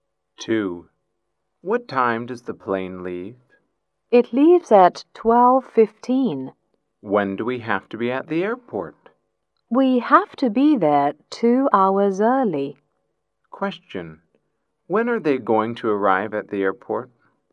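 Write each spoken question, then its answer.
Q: Question. When are they going to arrive at the airport?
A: At 10:15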